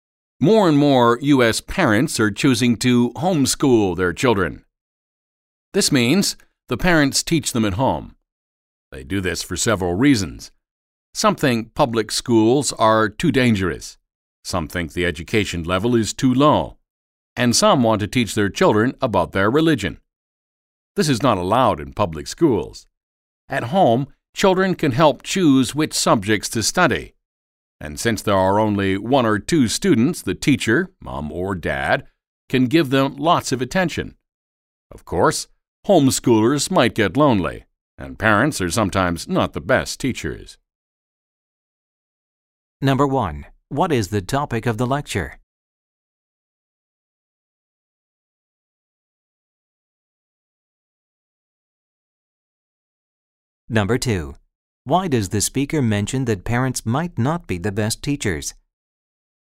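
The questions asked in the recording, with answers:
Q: What is the topic of the lecture?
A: Homeschooling in the U.S.: parents teaching their children at home

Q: Why does the speaker mention that parents might not be the best teachers?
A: To point out a disadvantage of homeschooling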